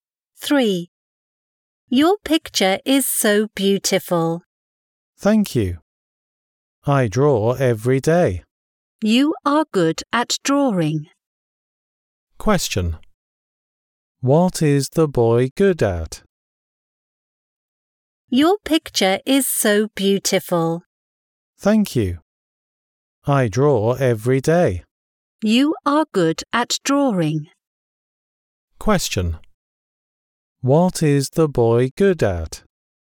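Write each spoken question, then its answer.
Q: What is the boy good at?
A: Drawing.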